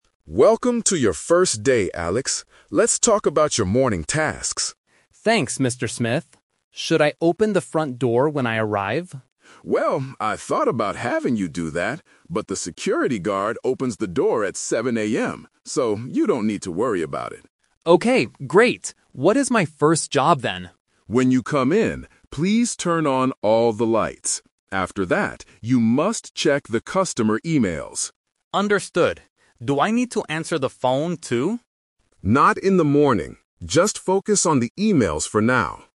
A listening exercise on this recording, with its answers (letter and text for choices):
Listen to the conversation between a manager and a new employee. Circle the correct answer (A, B, or C).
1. Who opens the front door in the morning?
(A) The manager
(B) Alex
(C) The security guard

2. What is the first thing Alex must do when he comes in?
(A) Open the front door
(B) Turn on the lights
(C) Check the emails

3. What does Alex NOT need to do in the morning?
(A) Answer the phone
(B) Turn on the lights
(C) Read customer emails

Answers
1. (C) The security guard
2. (B) Turn on the lights
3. (A) Answer the phone

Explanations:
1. The manager says, "...the security guard opens the door at 7 AM." Option (B) is the trap because Alex asks if he should do it, but the manager says no. Option (A) is a plausible guess but is not mentioned in the audio.
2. The manager clearly instructs: "When you come in, please turn on all the lights." Option (A) is a trap because it is discussed first, but Alex doesn't actually do it. Option (C) is a trap because checking emails happens "After that", making it the second task, not the first.
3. Alex asks, "Do I need to answer the phone, too?" and the manager replies, "Not in the morning." Options (B) and (C) are the exact tasks Alex is required to do.

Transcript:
Mr. Smith: Welcome to your first day, Alex. Let's talk about your morning tasks.
Alex: Thanks, Mr. Smith. Should I open the front door when I arrive?
Mr. Smith: Well, I thought about having you do that, but the security guard opens the door at 7 AM. So, you don't need to worry about it.
Alex: Okay, great. What is my first job then?
Mr. Smith: When you come in, please turn on all the lights. After that, you must check the customer emails.
Alex: Understood. Do I need to answer the phone, too?